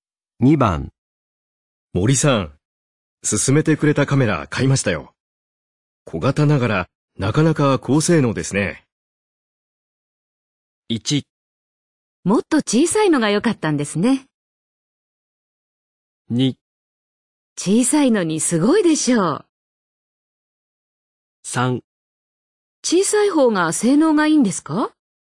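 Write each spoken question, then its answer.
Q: 森さん、進めてくれたカメラ買いましたよ。小型ながらなかなか高性能ですね。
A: 2: 小さいのにすごいでしょう。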